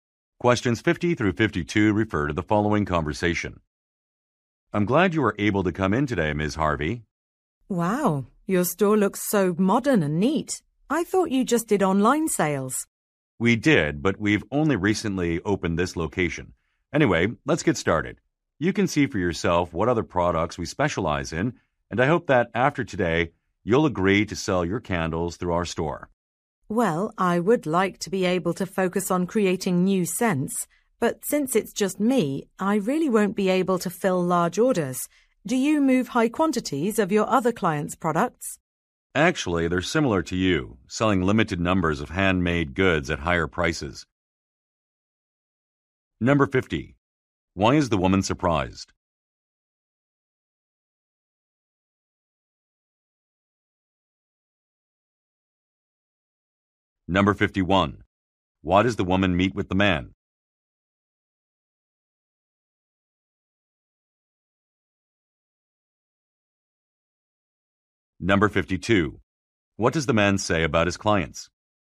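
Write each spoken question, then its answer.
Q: Why is the woman surprised?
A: She thought the store only did online sales

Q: Why does the woman meet with the man?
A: To discuss selling her candles through his store

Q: What does the man say about his clients?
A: They sell limited numbers of handmade goods at higher prices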